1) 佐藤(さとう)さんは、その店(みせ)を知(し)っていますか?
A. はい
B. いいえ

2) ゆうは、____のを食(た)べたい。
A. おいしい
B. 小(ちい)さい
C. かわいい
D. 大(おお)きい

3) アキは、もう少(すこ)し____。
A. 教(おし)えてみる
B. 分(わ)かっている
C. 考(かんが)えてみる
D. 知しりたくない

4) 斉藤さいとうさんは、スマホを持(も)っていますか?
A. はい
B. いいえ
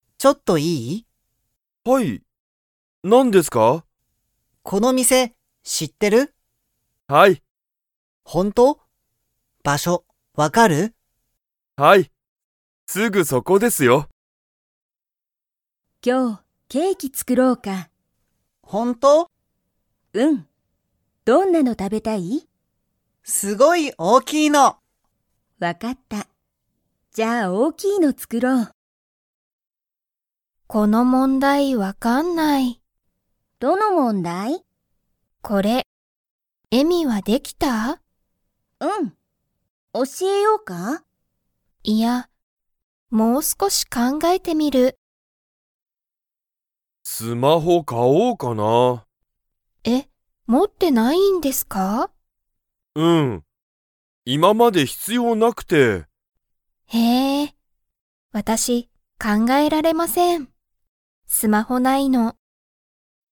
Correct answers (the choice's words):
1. はい
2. 大(おお)きい
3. 考(かんが)えてみる
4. いいえ

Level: Level 1